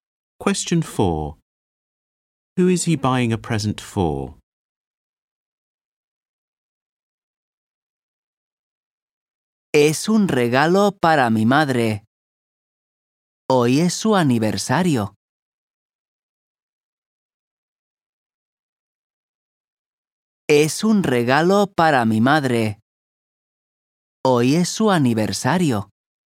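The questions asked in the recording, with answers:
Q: Who is he buying a present for?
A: His mother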